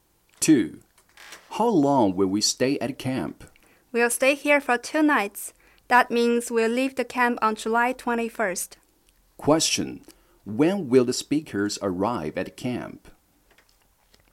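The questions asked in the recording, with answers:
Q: When will the speakers arrive at camp?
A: On July 19th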